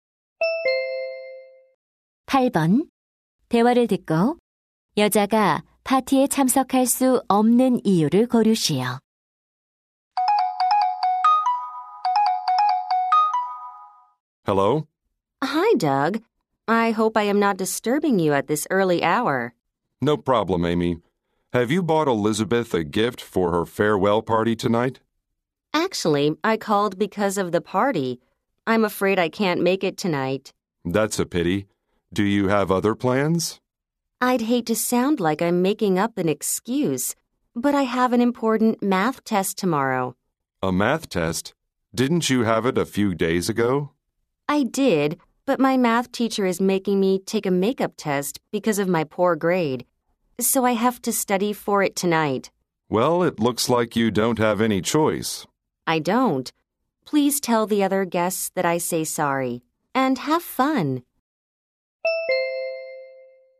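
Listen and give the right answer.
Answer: 수학 재시험 공부를 해야 해서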